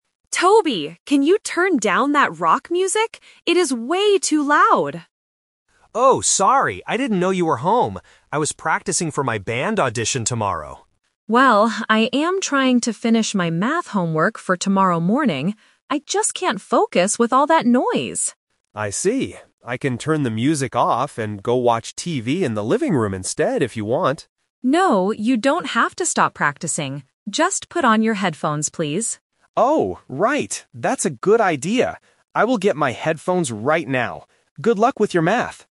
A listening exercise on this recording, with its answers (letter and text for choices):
Listen to the conversation between a brother and sister. Choose the correct answer (A, B, or C) for each question.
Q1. Why was Toby playing loud music?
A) He was doing his math homework.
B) He was practicing for an audition.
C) He was watching a music show on TV.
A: B) He was practicing for an audition.

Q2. Why is the girl complaining?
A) Because she hates rock music.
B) Because she wants to watch TV.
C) Because the noise stops her from studying.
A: C) Because the noise stops her from studying.

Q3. What will Toby finally do?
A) Turn off the music and watch TV.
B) Keep practicing with his headphones on.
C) Stop playing music and leave the house.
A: B) Keep practicing with his headphones on.

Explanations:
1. The boy explicitly states, "I was practicing for my band audition tomorrow." Option (A) is a trap because doing math homework is what his sister is doing, not him. Option (C) is a distractor using the word "TV", which he mentions later as a different plan.
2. The girl says, "I am trying to finish my math homework... I just can't focus with all that noise." Option (A) is a plausible guess, but she never says she hates the genre itself. Option (B) is a trap because the boy suggests watching TV, not the girl.
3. The girl suggests, "Just put on your headphones, please," and Toby agrees: "That's a good idea. I will get my headphones right now." Option (A) is the A2 "Twist" trap: he offered to turn it off and watch TV ("I can turn the music off and go watch TV..."), but his sister rejected this idea. Option (C) is not mentioned in the audio.

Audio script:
Girl: Toby, can you turn down that rock music? It is way too loud!
Boy: Oh, sorry! I didn't know you were home. I was practicing for my band audition tomorrow.
Girl: Well, I am trying to finish my math homework for tomorrow morning. I just can't focus with all that noise.
Boy: I see. I can turn the music off and go watch TV in the living room instead, if you want.
Girl: No, you don't have to stop practicing. Just put on your headphones, please.
Boy: Oh, right! That's a good idea. I will get my headphones right now. Good luck with your math!